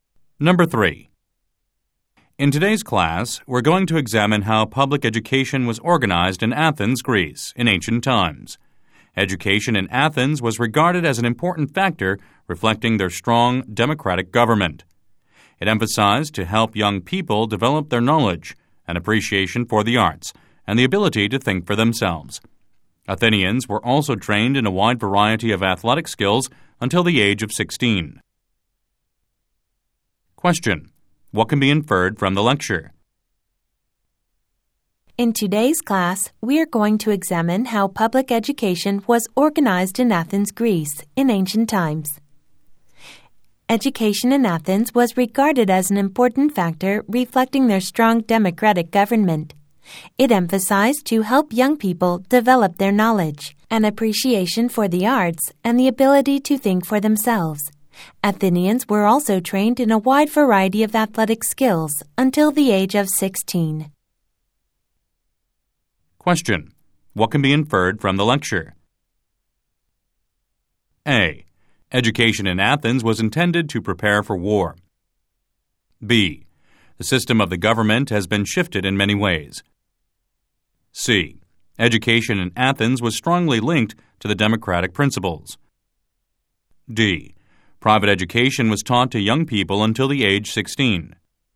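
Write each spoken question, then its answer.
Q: What can be inferred from the lecture?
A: C: Education in Athens was strongly linked to the democratic principles.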